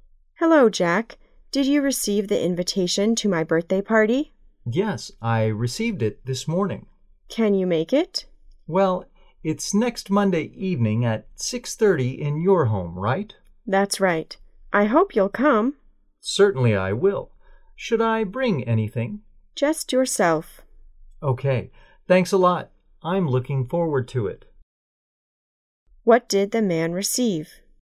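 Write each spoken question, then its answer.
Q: What did the man receive?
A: An invitation to a birthday party

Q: Where will the party be held?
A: At the woman's home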